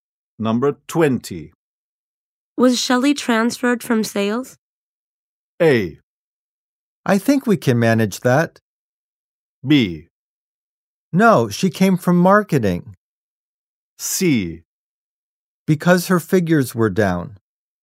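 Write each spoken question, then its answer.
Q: Was Shelley transferred from sales?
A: B: No, she came from marketing.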